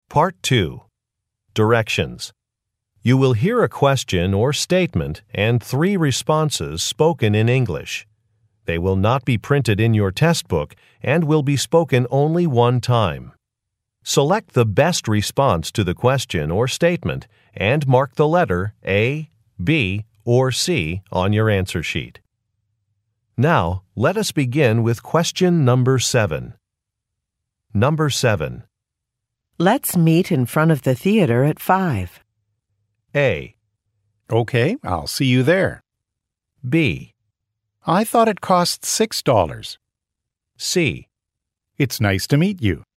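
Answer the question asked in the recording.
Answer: Okay, I'll see you there.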